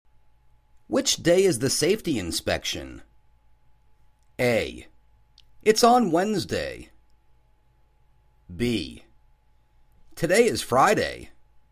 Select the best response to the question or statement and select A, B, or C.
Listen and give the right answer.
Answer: It's on Wednesday.